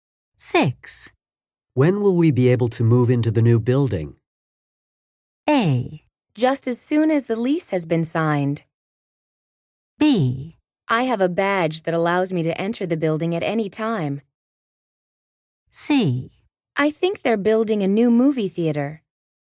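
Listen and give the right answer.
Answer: A: Just as soon as the lease has been signed.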